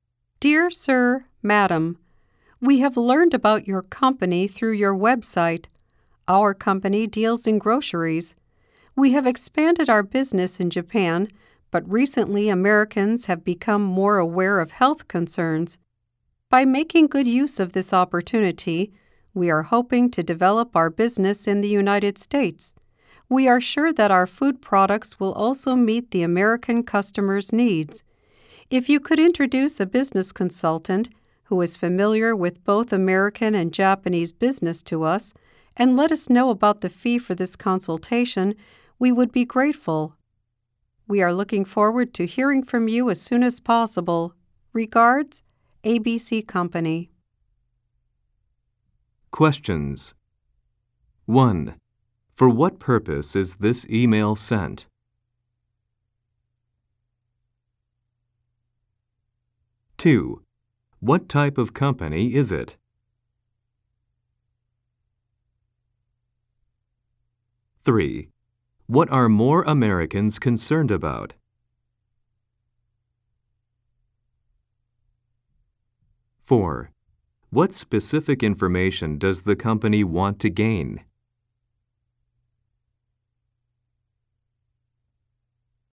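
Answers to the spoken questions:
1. To ask for an introduction to a business consultant familiar with American and Japanese business, and to learn the consultation fee
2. A grocery company
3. Health
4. The fee for the consultation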